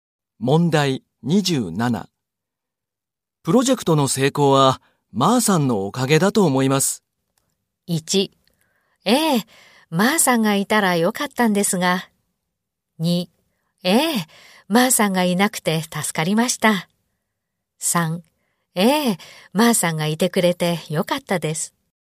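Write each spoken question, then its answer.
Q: プロジェクトの成功は、まーさんのおかげだと思います。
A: 3: ええ、まーさんがいてくれてよかったです。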